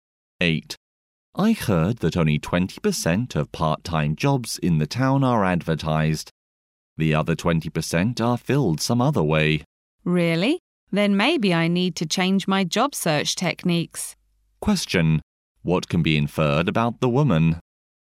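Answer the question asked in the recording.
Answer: She is looking for a part-time job and may change how she searches.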